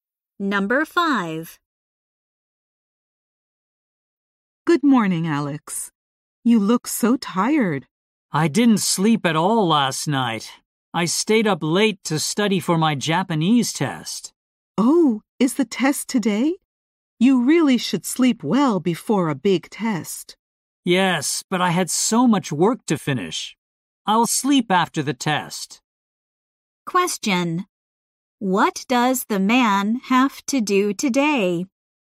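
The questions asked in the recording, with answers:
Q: What does the man have to do today?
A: Take a Japanese test.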